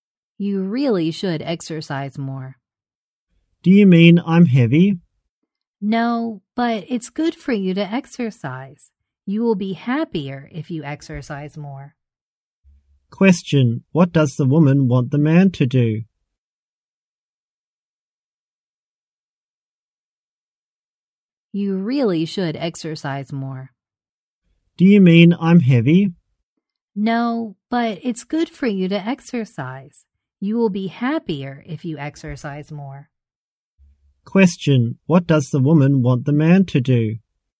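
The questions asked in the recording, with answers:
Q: What does the woman want the man to do?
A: Exercise more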